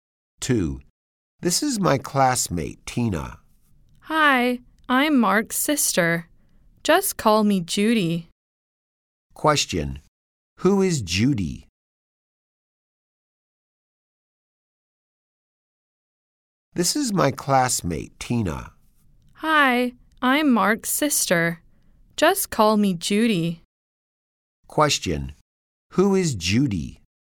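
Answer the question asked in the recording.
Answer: Mark's sister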